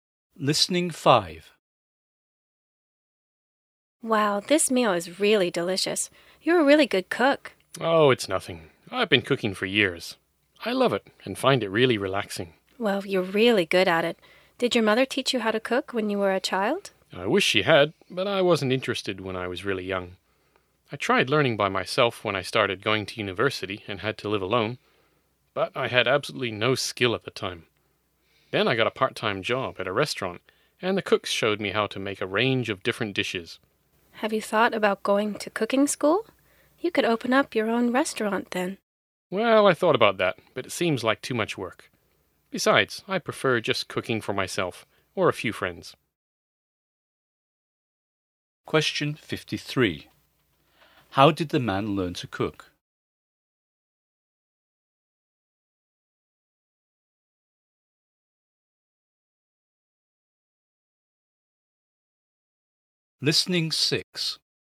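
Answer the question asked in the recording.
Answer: The cooks at a restaurant where he worked part-time taught him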